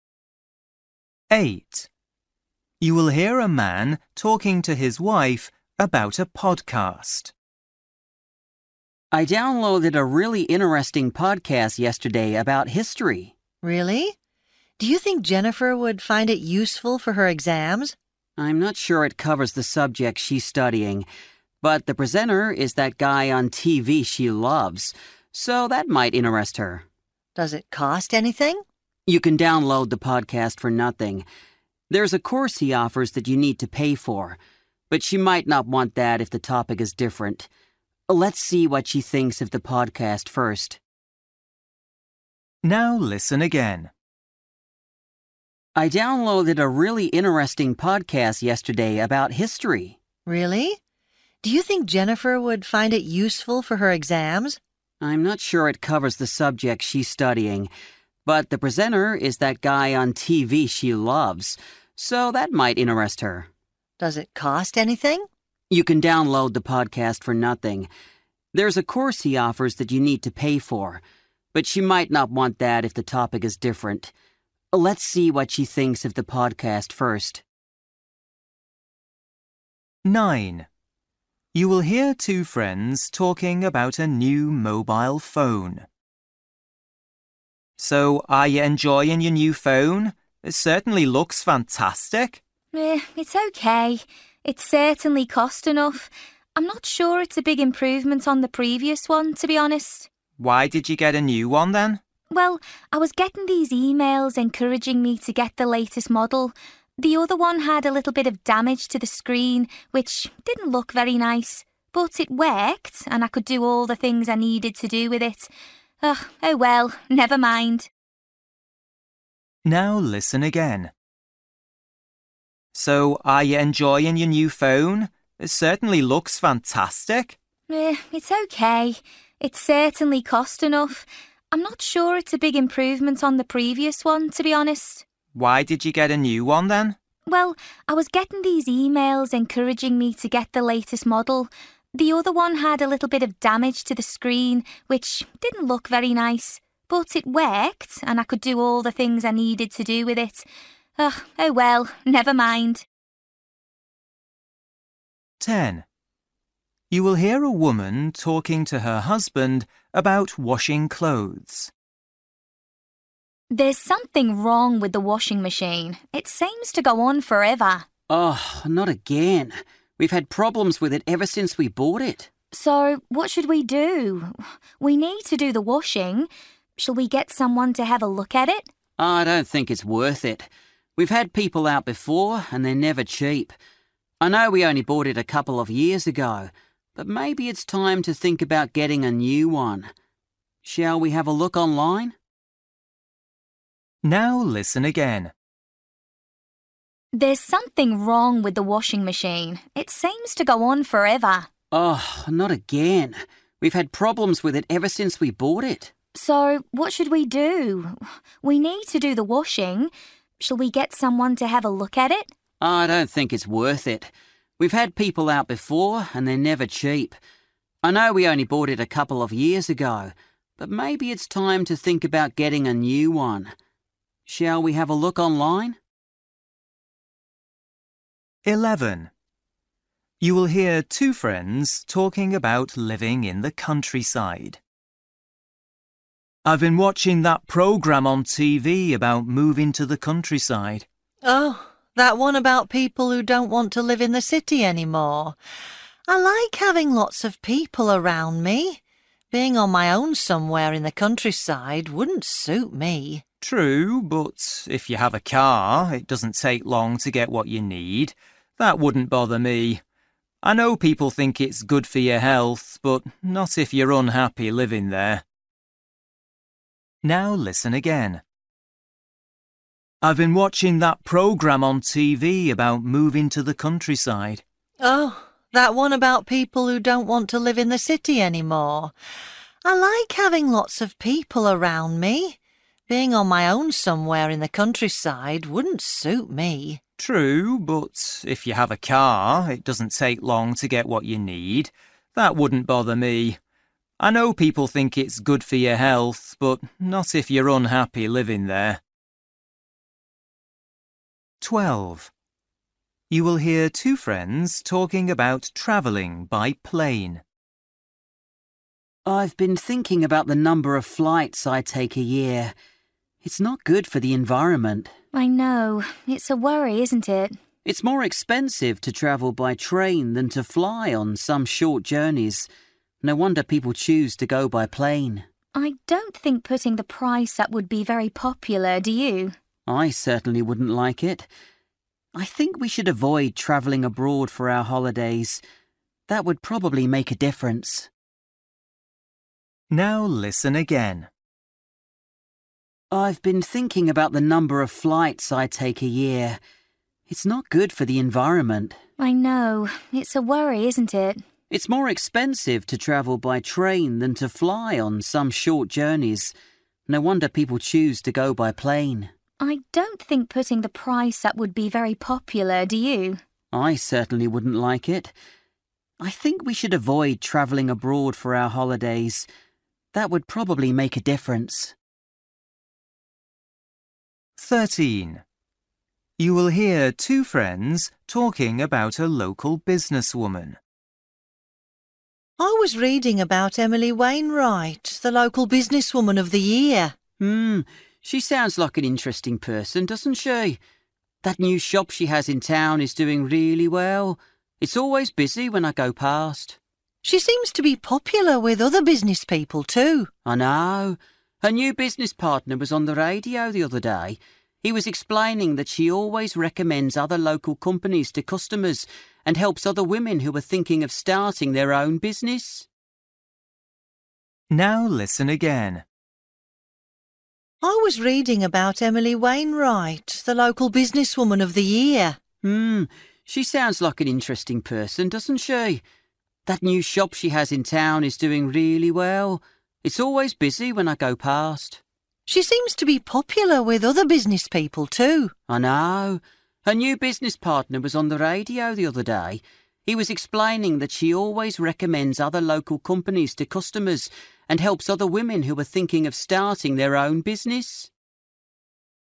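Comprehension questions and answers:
For each question, choose the correct answer.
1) You will hear a man talking to his wife about a podcast. The man thinks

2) You will hear two friends talking about a new mobile phone. The woman says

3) You will hear a woman talking to her husband about washing clothes. The man says the washing machine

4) You will hear two friends talking about living in the countryside. What does the woman say?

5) You will hear two friends talking about travelling by plane. The man thinks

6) You will hear two friends talking about a local businesswoman. What does the man say about her?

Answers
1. Jennifer might be interested because she likes the presenter
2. she got it because emails encouraged her to buy the latest model
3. should probably be replaced with a new one
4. She would not like being on her own in the countryside
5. people should avoid travelling abroad for holidays
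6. She helps other local businesses and women starting businesses

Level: Luyện nghe trình độ B1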